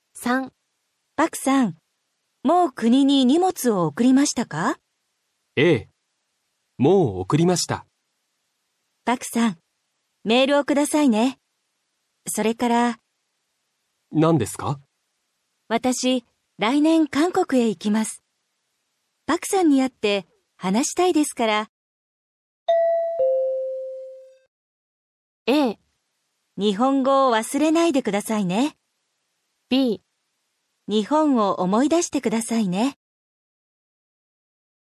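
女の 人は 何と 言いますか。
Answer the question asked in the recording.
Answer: a. 日本語を 忘れないでください。

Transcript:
B: パクさん、 もう 国に 荷物を 送りましたか。
A: ええ、 もう 送りました。
B: パクさん、メールを くださいね。 それから...。
A: 何ですか。
B: 私、 来年韓国へ 行きます。
パクさんに 会って、 話したいですから、
a. 日本語を 忘れないでください。
b. 日本を 思い出してくださいね。

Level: 初級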